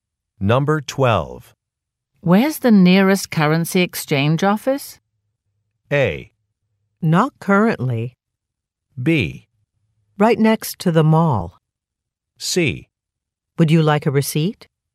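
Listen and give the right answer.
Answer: B: Right next to the mall.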